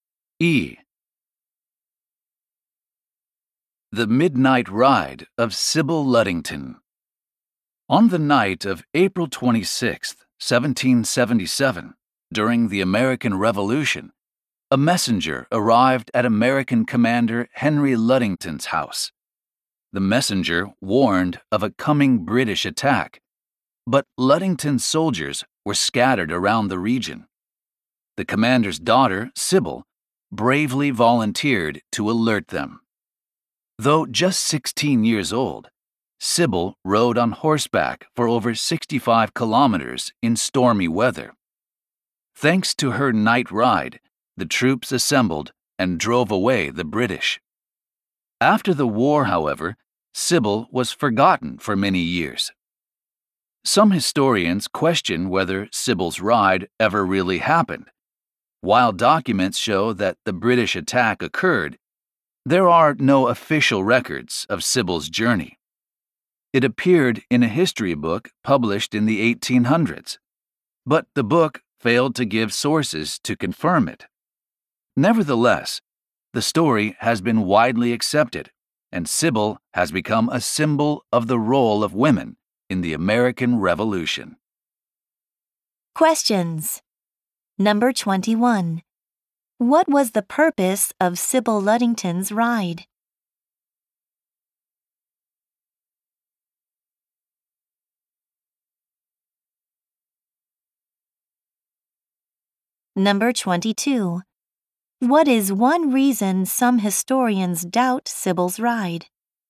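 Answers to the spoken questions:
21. To alert scattered soldiers of a coming British attack
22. There are no official records, and the book gave no sources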